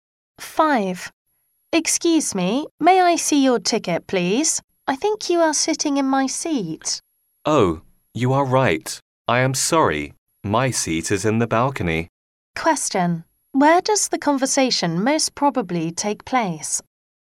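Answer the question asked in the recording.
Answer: In a theater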